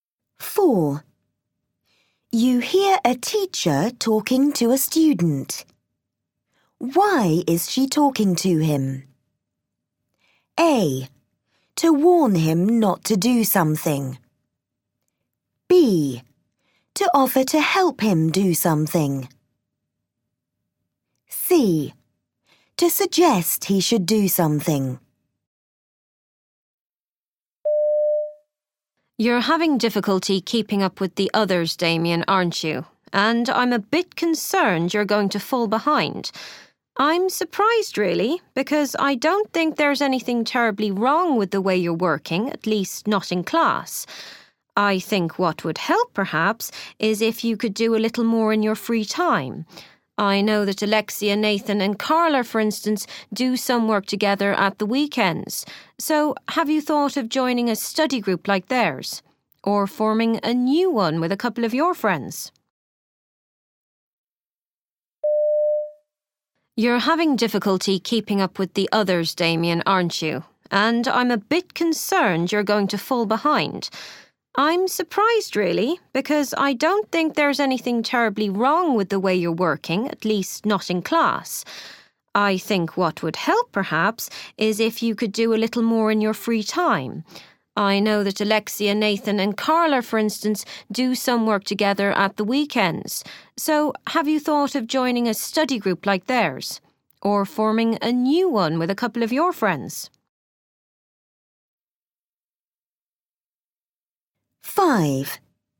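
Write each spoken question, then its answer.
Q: Why is she talking to him?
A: C: To suggest he should do something.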